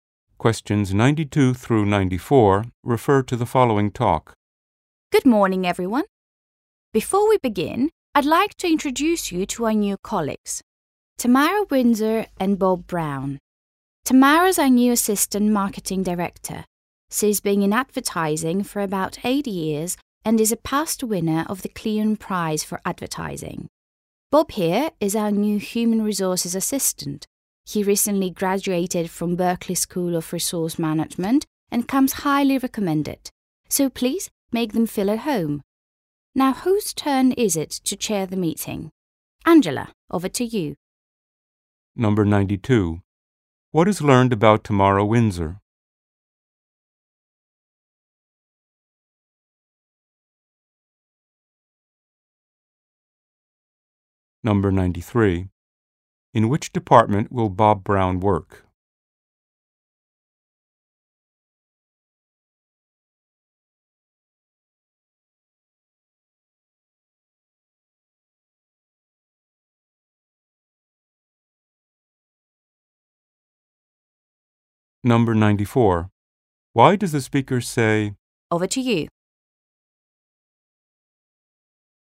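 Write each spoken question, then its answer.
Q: What is learned about Tamara Windsor?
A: She has won an advertising prize

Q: In which department will Bob Brown work?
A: Human resources

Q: Why does the speaker say,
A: To let Angela chair the meeting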